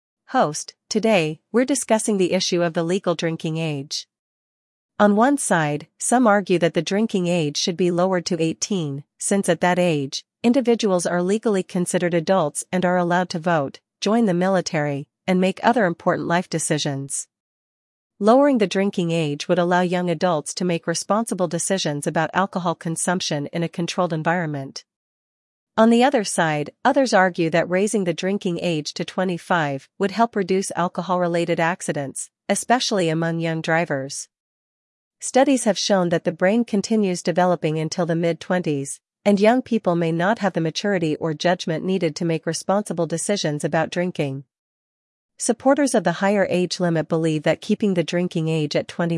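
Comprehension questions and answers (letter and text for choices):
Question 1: What is the argument for lowering the legal drinking age?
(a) Young adults can make responsible decisions about drinking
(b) Drinking at 18 is unsafe for everyone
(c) Only older adults should be allowed to drink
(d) Alcohol consumption should be banned altogether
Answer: (a) Young adults can make responsible decisions about drinking

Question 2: According to the supporters of a higher drinking age, what is a major concern for young people?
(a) They have difficulty affording alcohol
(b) They may lack the maturity to make responsible drinking decisions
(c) They prefer to drink at home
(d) They do not drink enough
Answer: (b) They may lack the maturity to make responsible drinking decisions

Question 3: How do the two viewpoints differ on the legal drinking age?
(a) One side believes it should be raised to 25, while the other wants to lower it to 18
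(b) One side supports banning alcohol altogether, and the other side doesn't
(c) Both sides agree on the age limit but differ on other laws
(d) Both sides believe the legal age should be 21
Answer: (a) One side believes it should be raised to 25, while the other wants to lower it to 18

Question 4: What is the main argument in favor of a drinking age of 21 or higher?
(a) It will lead to fewer accidents and health issues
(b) It will allow young people to consume more alcohol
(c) It will help create more jobs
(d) It will encourage drinking at home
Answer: (a) It will lead to fewer accidents and health issues

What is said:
Host: Today, we're discussing the issue of the legal drinking age. On one side, some argue that the drinking age should be lowered to 18, since at that age, individuals are legally considered adults and are allowed to vote, join the military, and make other important life decisions. 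Lowering the drinking age would allow young adults to make responsible decisions about alcohol consumption in a controlled environment.
On the other side, others argue that raising the drinking age to 25 would help reduce alcohol-related accidents, especially among young drivers. Studies have shown that the brain continues developing until the mid-20s, and young people may not have the maturity or judgment needed to make responsible decisions about drinking.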